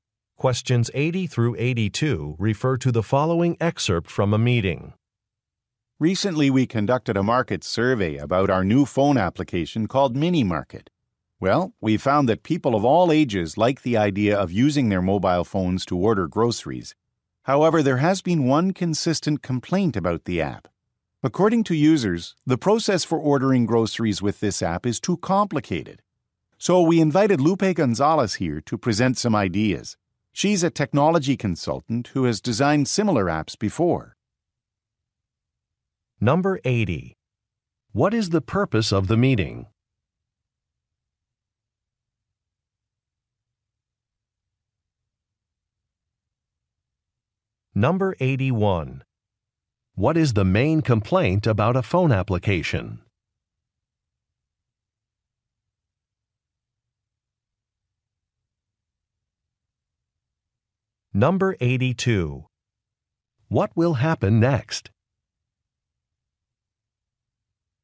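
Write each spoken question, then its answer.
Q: What is the main complaint about a phone application?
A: Ordering groceries is too complicated

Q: What will happen next?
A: A consultant, Lupe Gonzalez, will present ideas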